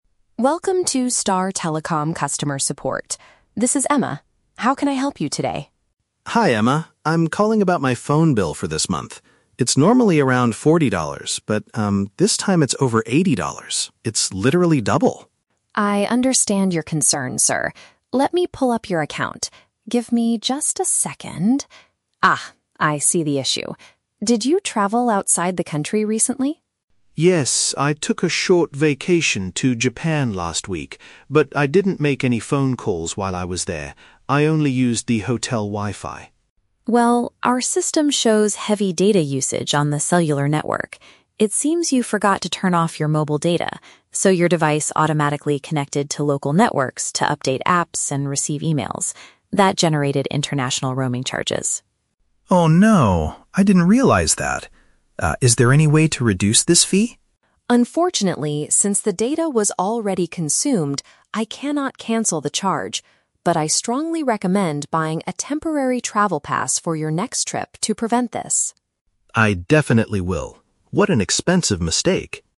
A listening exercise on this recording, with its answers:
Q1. What is the customer's main reason for calling?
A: To ask why his current invoice is twice the usual amount.

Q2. How did the extra charges occur during the customer's trip?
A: His device downloaded information using foreign networks.

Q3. What does the agent suggest the man do in the future?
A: Purchase a special package before going abroad again.

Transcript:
Agent: Welcome to Star Telecom customer support. This is Emma. How can I help you today?
Customer: Hi, Emma. I'm calling about my phone bill for this month. It's normally around forty dollars, but, um, this time it's over eighty dollars. It's literally double!
Agent: I understand your concern, sir. Let me pull up your account. Give me just a second... Ah, I see the issue. Did you travel outside the country recently?
Customer: Yes, I took a short vacation to Japan last week. But I didn't make any phone calls while I was there. I only used the hotel Wi-Fi.
Agent: Well, our system shows heavy data usage on the cellular network. It seems you forgot to turn off your mobile data, so your device automatically connected to local networks to update apps and receive emails. That generated international roaming charges.
Customer: Oh no... I didn't realize that. Ah, is there any way to reduce this fee?
Agent: Unfortunately, since the data was already consumed, I cannot cancel the charge. But I strongly recommend buying a temporary travel pass for your next trip to prevent this.